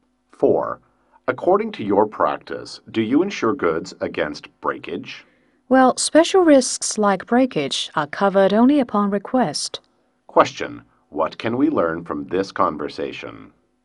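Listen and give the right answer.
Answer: Breakage is covered only on request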